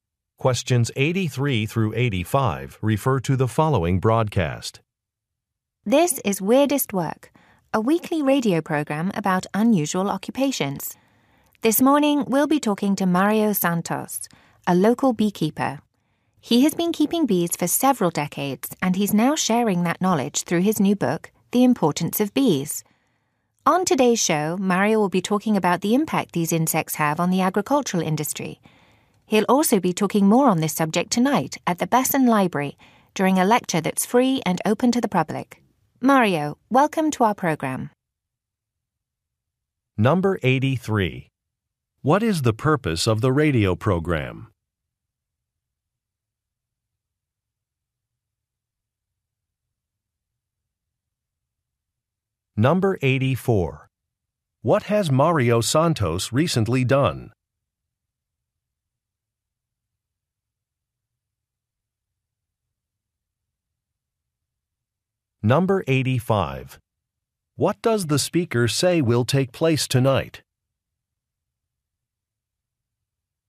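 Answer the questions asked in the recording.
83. To talk about unusual occupations
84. Written a book
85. A free lecture at the Besson Library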